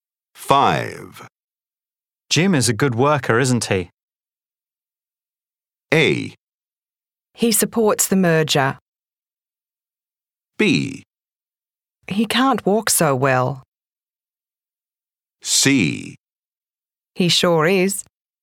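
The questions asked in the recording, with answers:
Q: Jim is a good worker, isn't he?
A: C: He sure is.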